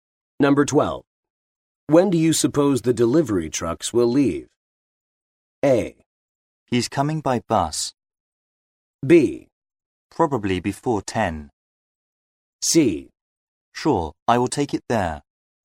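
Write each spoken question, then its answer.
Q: When do you suppose the delivery trucks will leave?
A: B: Probably before 10.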